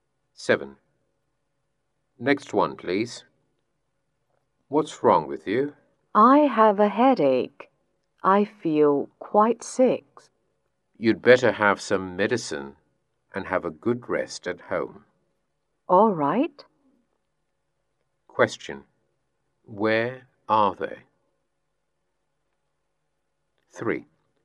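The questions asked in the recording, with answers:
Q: Where are they?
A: In a hospital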